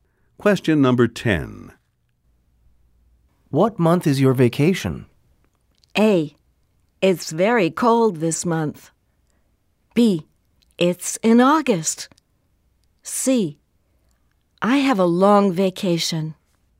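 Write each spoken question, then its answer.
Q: What month is your vacation?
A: B: It's in August.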